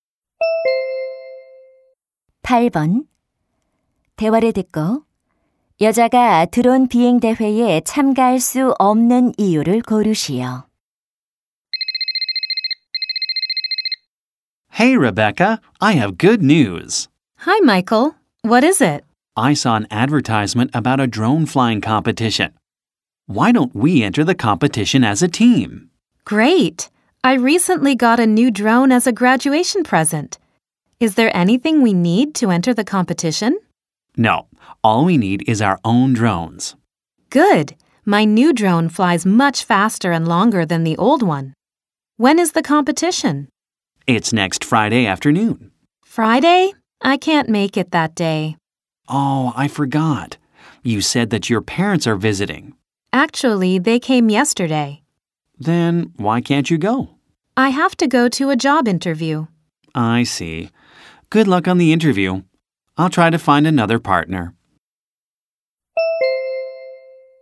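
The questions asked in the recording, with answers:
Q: 대화를 듣고 여자가 드론 비행 대회에 참가할 수 없는 이유를 고르시오.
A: 취업 면접에 가야 해서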